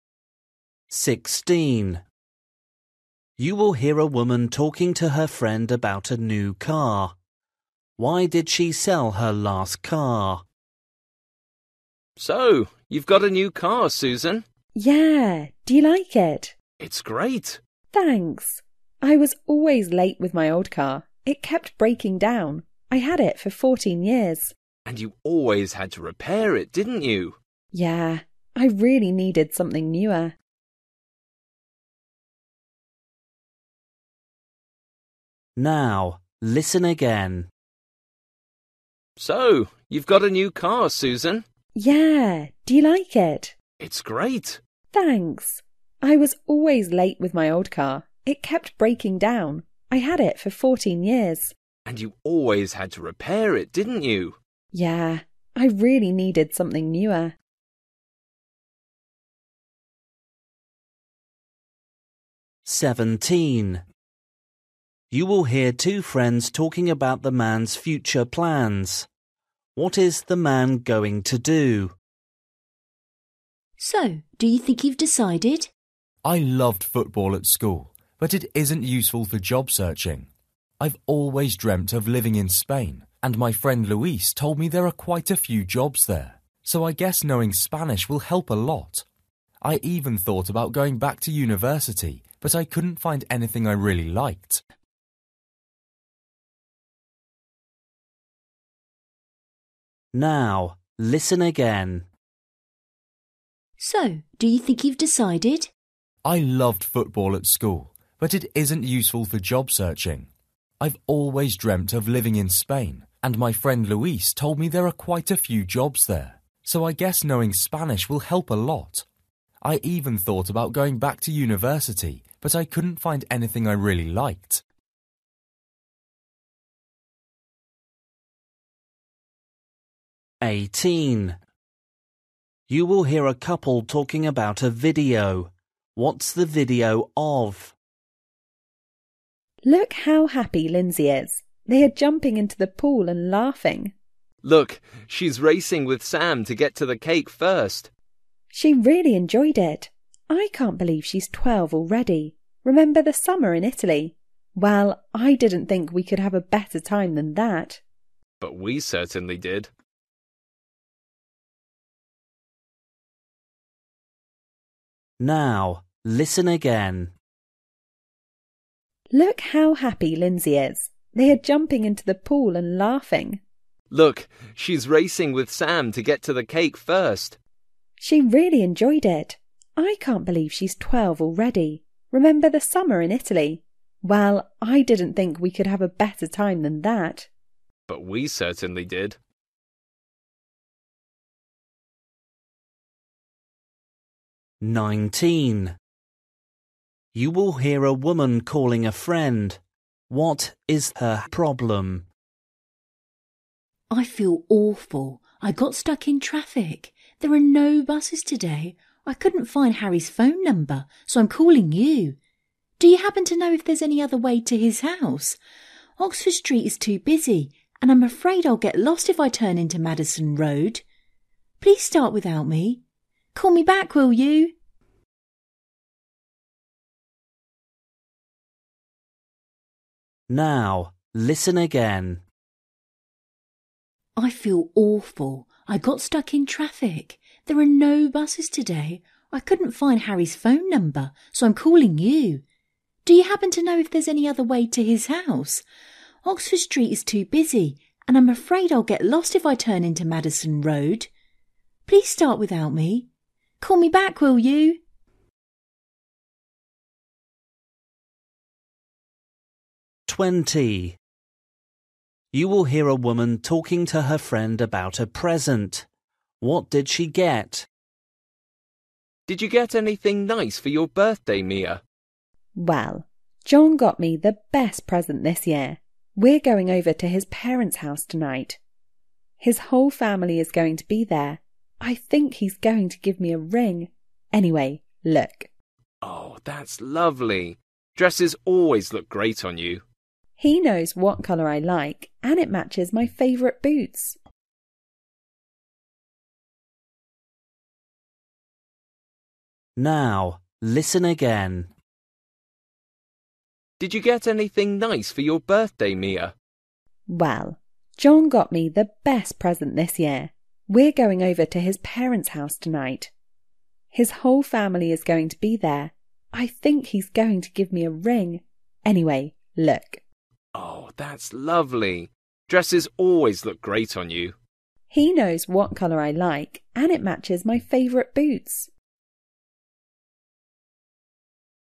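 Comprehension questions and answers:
For each question, choose the correct answer.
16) You will hear a woman talking to her friend about her new car. Why did she sell her last car?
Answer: It kept breaking down.

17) You will hear two friends talking about the man's future plans. What is the man going to do?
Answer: Move to Spain to work

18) You will hear a couple talking about a video. What's the video of?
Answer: Lindsay's 12th birthday party

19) You will hear a woman calling a friend. What's her problem?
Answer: She is stuck in traffic and will be late.

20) You will hear a woman talking to her friend about a present. What did she get?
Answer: A dress

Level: Luyện nghe trình độ A2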